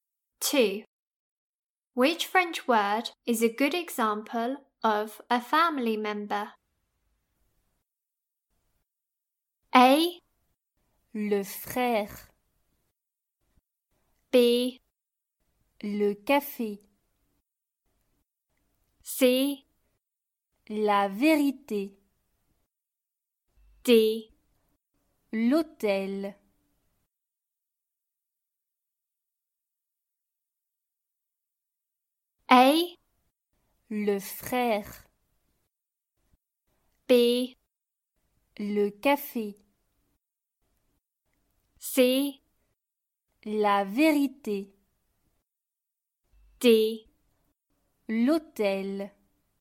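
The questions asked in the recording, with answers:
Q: Which French word is a good example of a family member?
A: A: Le frère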